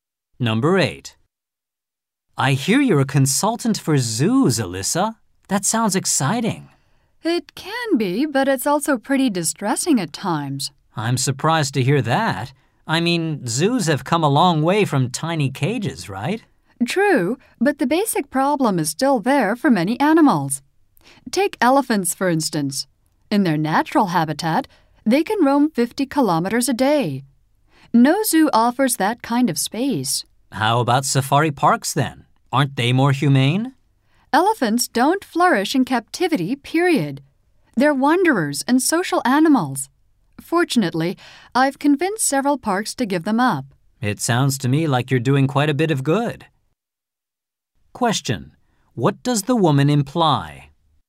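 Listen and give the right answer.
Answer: Elephants should not be kept in captivity, even in safari parks.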